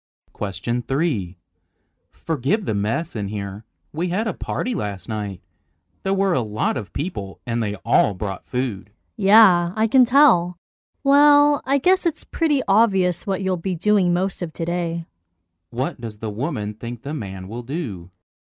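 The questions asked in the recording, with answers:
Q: What does the woman think the man will do?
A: Clean up the room after the party.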